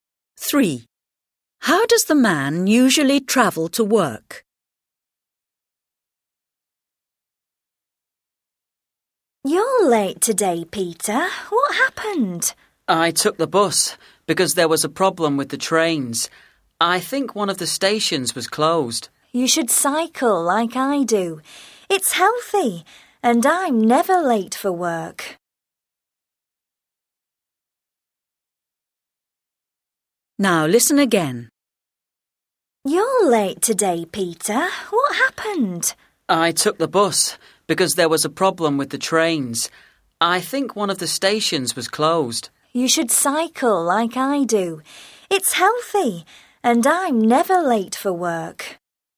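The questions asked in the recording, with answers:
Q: How does the man usually travel to work?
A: By train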